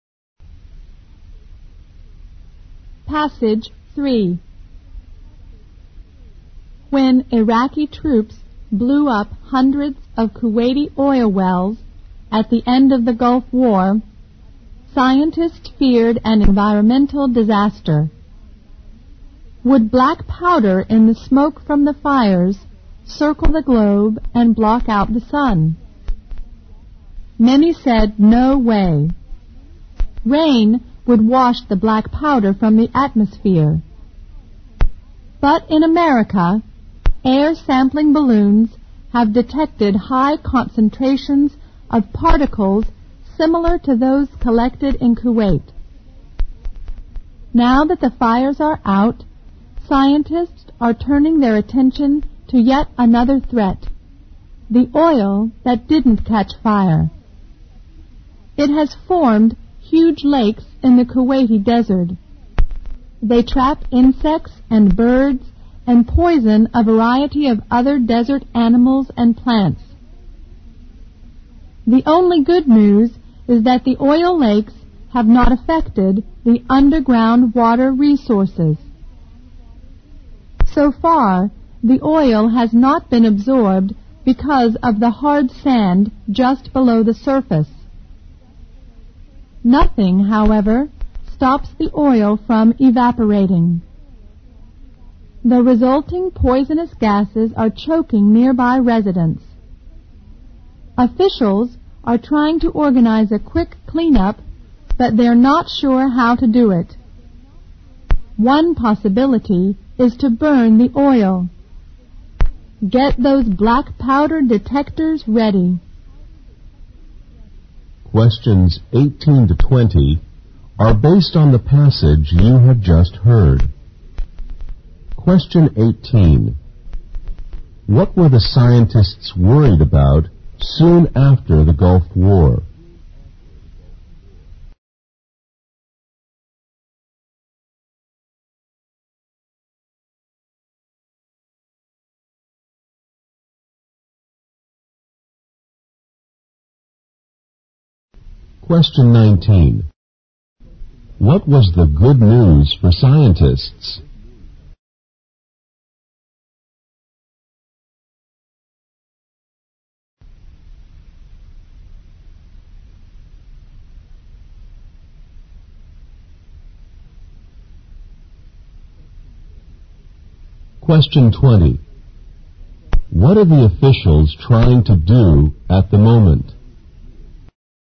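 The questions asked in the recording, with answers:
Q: What were the scientists worried about soon after the Gulf War?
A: An environmental disaster: black smoke from the fires blocking out the sun

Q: What was the good news for scientists?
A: The oil lakes had not affected underground water

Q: What are the officials trying to do at the moment?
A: Organize a quick cleanup of the oil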